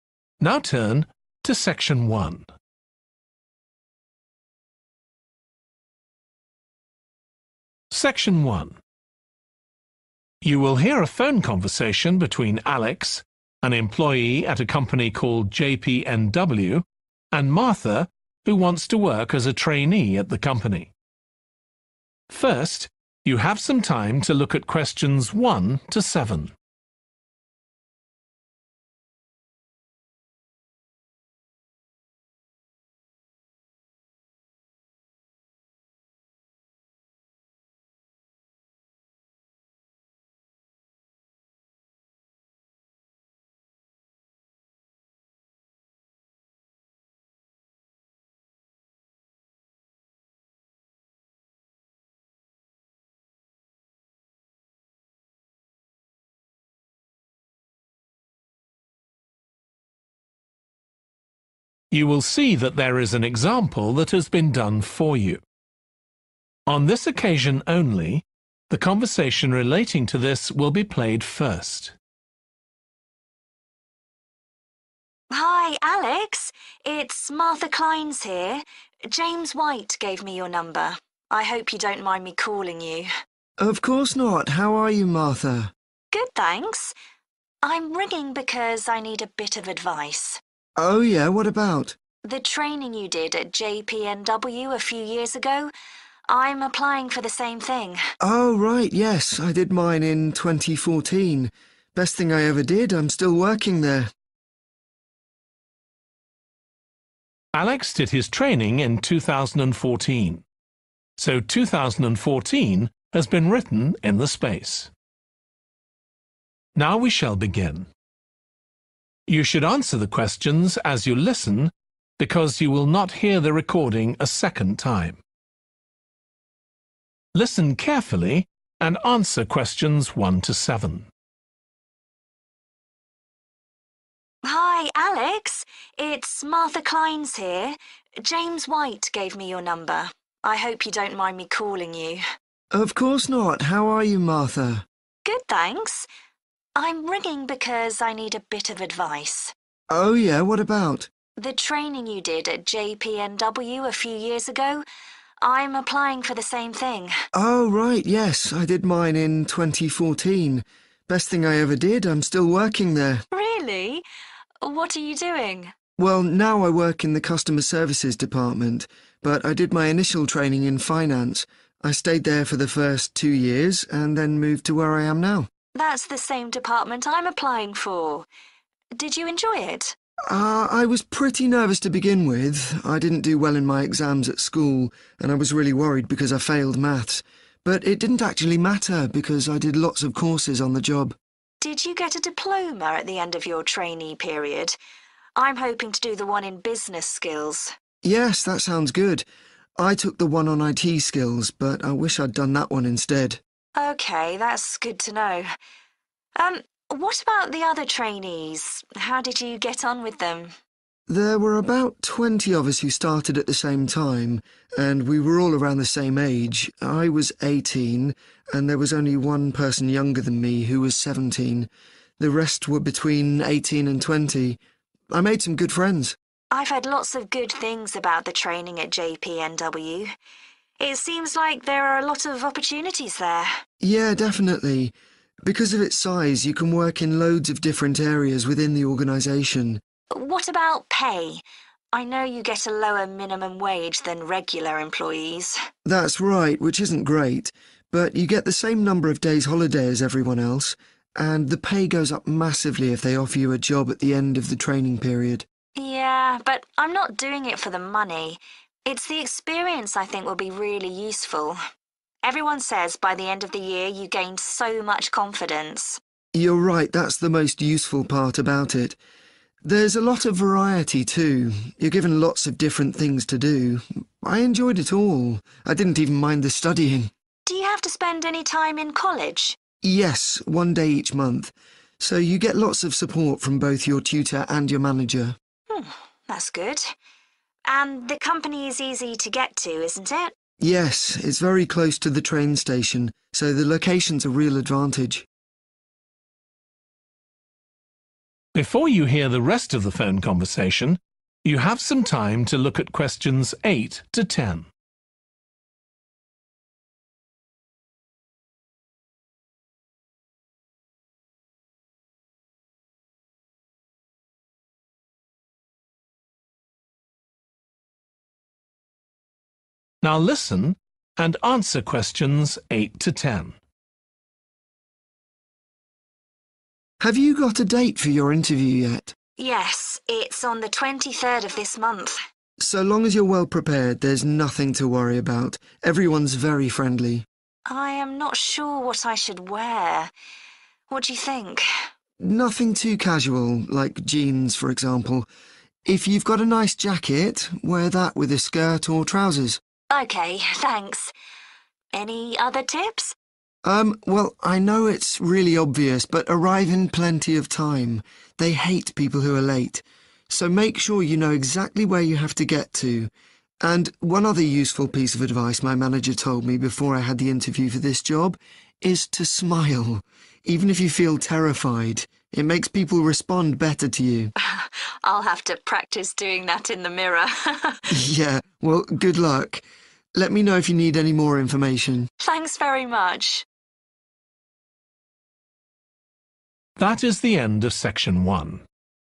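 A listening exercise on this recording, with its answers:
Complete the notes below. Write ONE WORD AND/OR A NUMBER for each answer.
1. At first, Alex did his training in the department.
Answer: finance

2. Alex didn't have a qualification from school in .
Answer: maths

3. Alex thinks he should have done the diploma in skills.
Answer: business

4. Age of other trainees: the youngest was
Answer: 17

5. Trainees receive the same amount of as permanent staff.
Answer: holiday

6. Trainees go to one day per month.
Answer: college

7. The company is in a convenient .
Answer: location

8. Don't wear .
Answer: jeans

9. Don't be .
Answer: late

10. Make sure you .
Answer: smile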